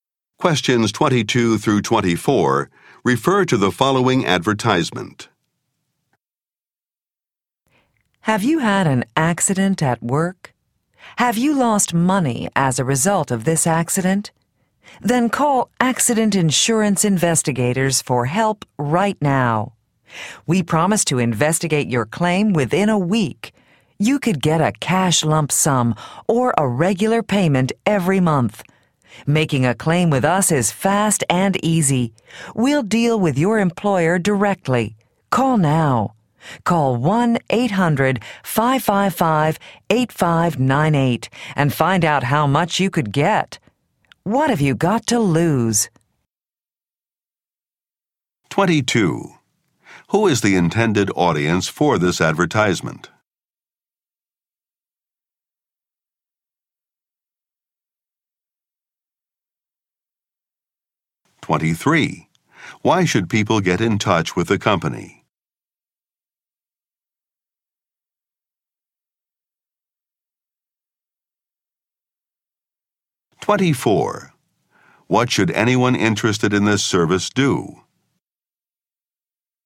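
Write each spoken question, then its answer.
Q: Who is the intended audience for this advertisement?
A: People who have had an accident at work

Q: What should anyone interested in this service do?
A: Call 1-800-555-8598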